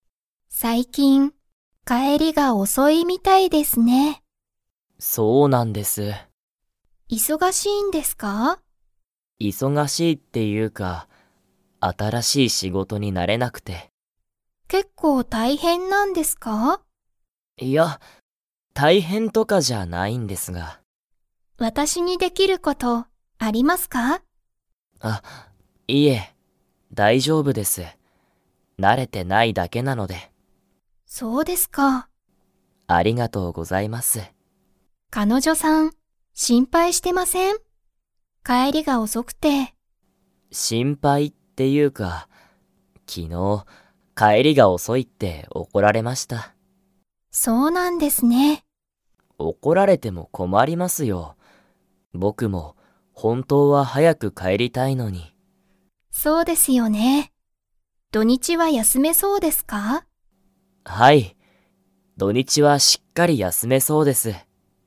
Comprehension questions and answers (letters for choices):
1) 鈴木(すずき)さんは、新(あたら)しい仕事(しごと)に 。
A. 慣(な)れた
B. 慣(な)れてない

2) 昨日(きのう)、鈴木(すずき)さんは誰(だれ)に怒(おこ)られましたか?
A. 彼女(かのじょ)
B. 母(はは)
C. 父(ちち)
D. 山田(やまだ)さん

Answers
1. B
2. A

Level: Level 4